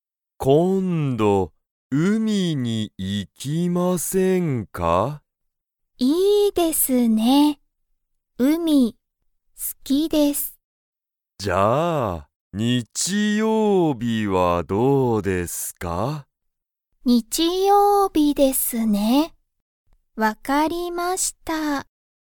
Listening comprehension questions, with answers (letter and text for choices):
Comprehension Quiz (Skip if you don't understand the conversation yet)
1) あかねさんは、____が好(す)きだ。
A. 日曜日(にちようび)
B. 今度こんど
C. 電話(でんわ)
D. 海(うみ)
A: D. 海(うみ)

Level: Level 1